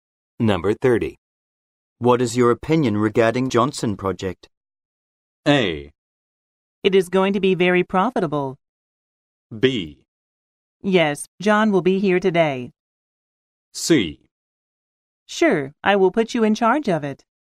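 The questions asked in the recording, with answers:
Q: What is your opinion regarding Johnson Project?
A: A: It is going to be very profitable.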